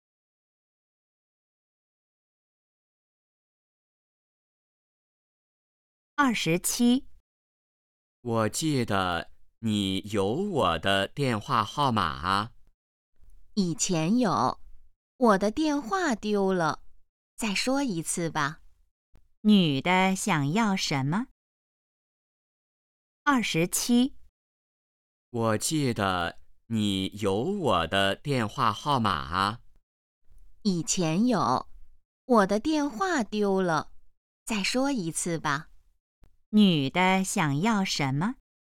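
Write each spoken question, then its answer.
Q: 女的想要什么?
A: 电话号码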